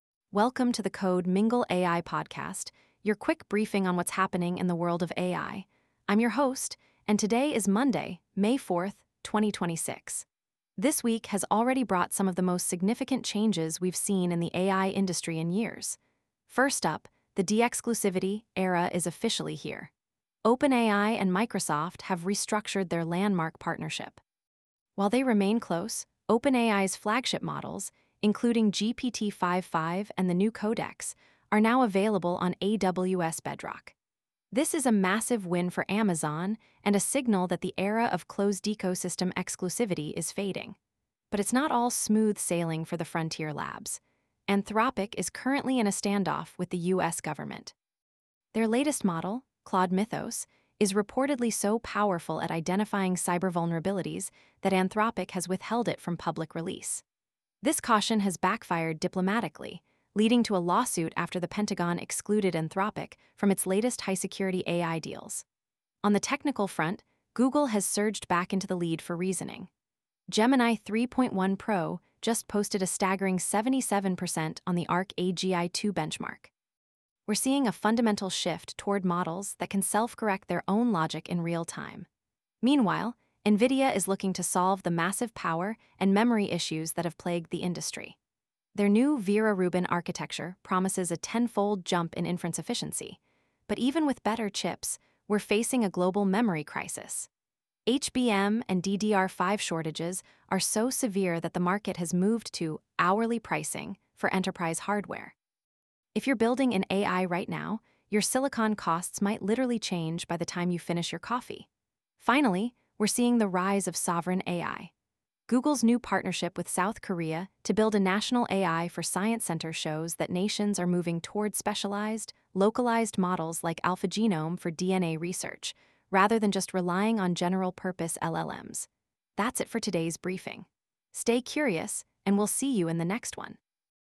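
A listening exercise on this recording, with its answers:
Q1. Which cloud platform did OpenAI recently launch GPT-5.5 on, ending its Azure exclusivity?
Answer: AWS Bedrock

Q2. What is the name of Anthropic's latest model that was withheld from public release due to safety concerns?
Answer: Claude Mythos

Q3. What score did Google Gemini 3.1 Pro achieve on the ARC-AGI-2 reasoning benchmark?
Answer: 77.1%

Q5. Why has the DRAM market moved to an 'hourly pricing' model for AI hardware?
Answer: Severe HBM and DDR5 shortages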